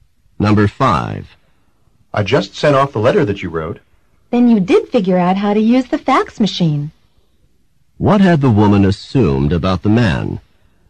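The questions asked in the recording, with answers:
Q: What had the woman assumed about the man?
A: That he didn't know how to use the fax machine.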